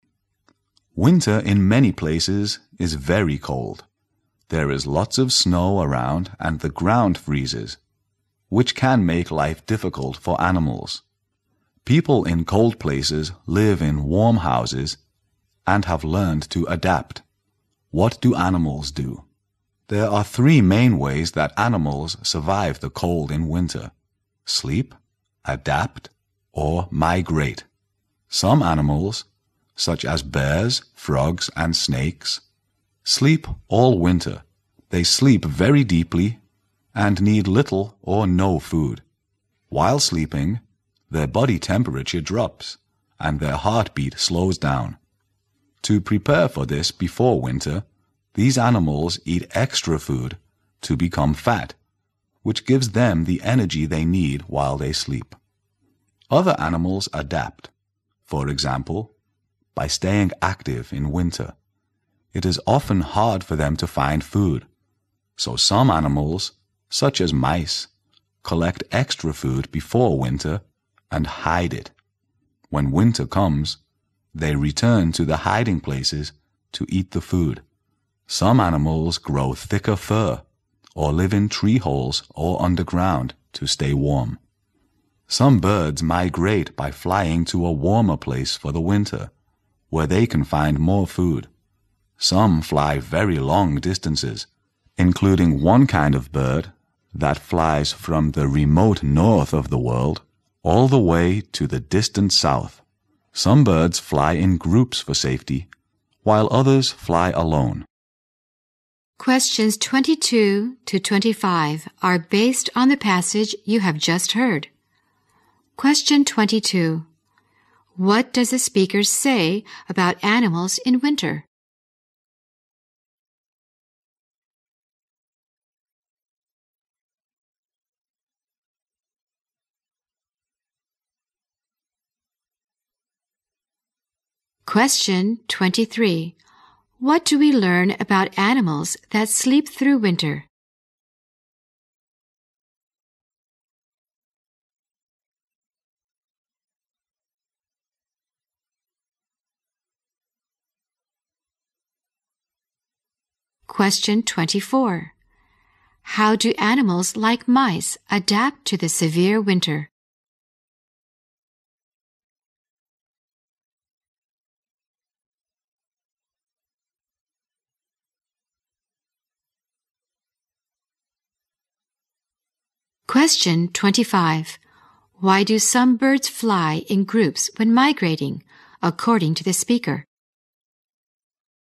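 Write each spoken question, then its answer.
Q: How do animals like mice adapt to the severe winter?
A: They collect extra food before winter and hide it.

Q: Why do some birds fly in groups when migrating, according to the speaker?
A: For safety.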